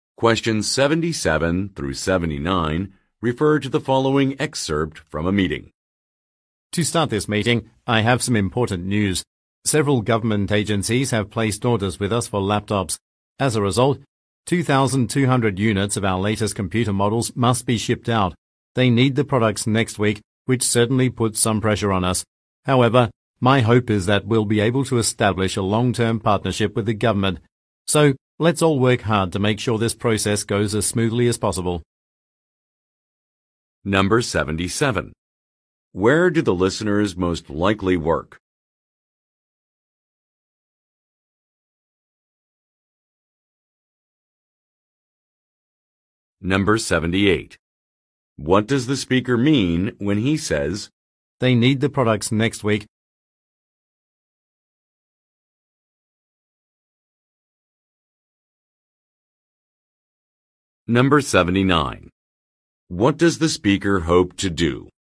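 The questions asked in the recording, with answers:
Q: Where do the listeners most likely work?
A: At a computer (laptop) manufacturer

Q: What does the speaker mean when he says,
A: The deadline is tight, which puts pressure on them

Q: What does the speaker hope to do?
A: Establish a long-term partnership with the government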